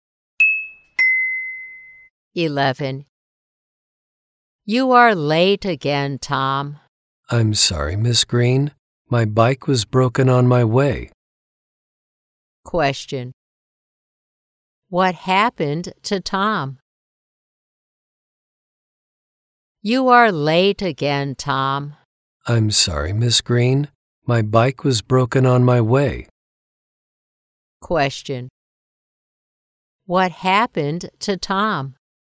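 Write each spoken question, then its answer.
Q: What happened to Tom?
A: His bike broke on his way, so he was late.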